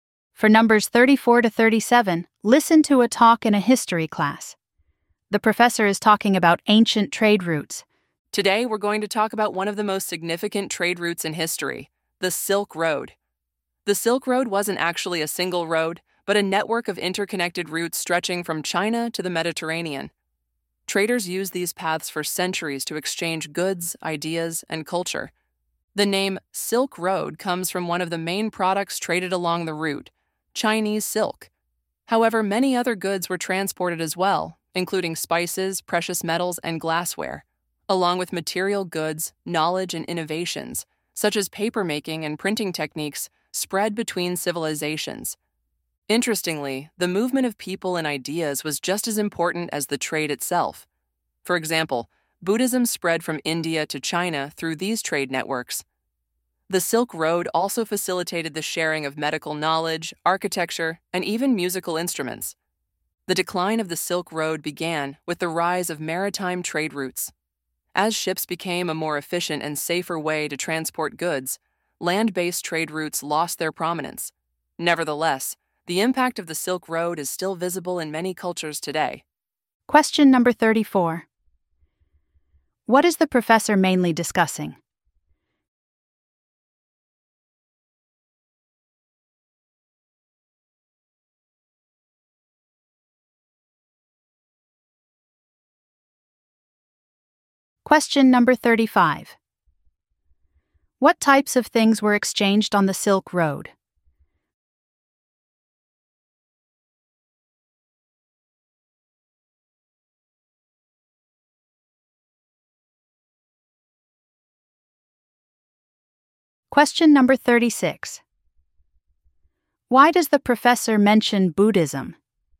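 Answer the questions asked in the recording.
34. The Silk Road
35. Goods like silk, spices, metals and glassware, plus ideas and knowledge
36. As an example of ideas spreading along the trade routes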